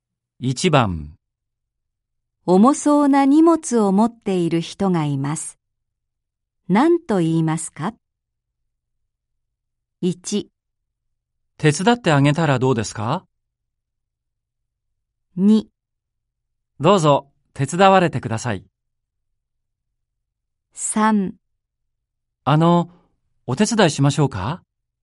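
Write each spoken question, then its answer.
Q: 重そうな荷物を持っている人がいます。何と言いますか?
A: 3: お手伝いしましょうか?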